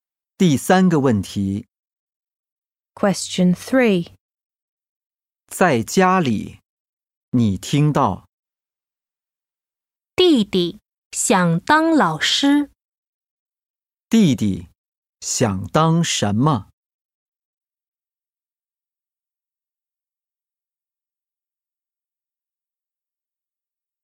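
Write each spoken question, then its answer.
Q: 弟弟想当什么?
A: 老师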